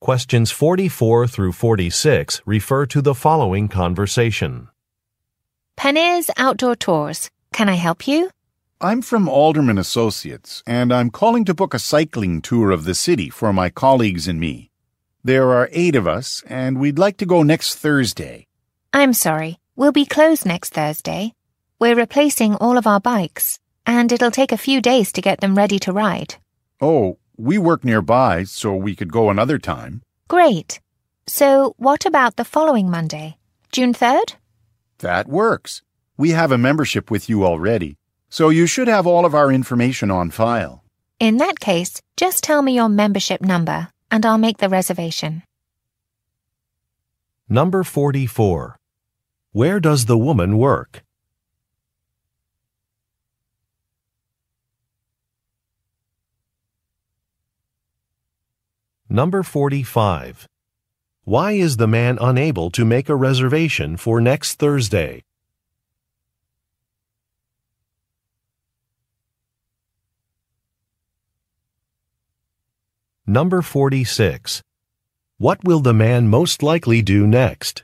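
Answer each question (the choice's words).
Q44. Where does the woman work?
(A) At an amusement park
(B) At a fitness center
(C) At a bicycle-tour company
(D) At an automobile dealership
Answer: At a bicycle-tour company

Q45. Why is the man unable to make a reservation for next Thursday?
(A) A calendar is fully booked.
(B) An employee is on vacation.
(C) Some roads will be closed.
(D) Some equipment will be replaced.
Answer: Some equipment will be replaced.

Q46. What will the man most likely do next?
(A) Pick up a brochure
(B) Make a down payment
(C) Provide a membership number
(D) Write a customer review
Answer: Provide a membership number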